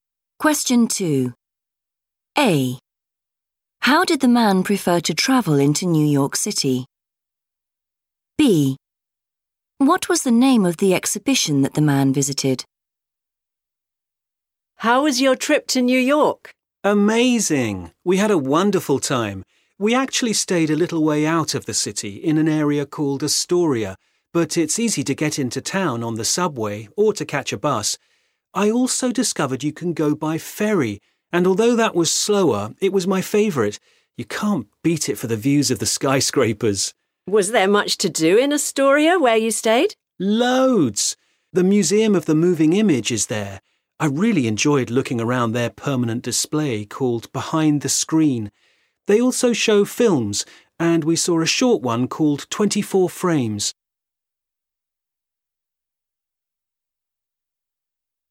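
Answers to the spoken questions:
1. by ferry
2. Behind the Screen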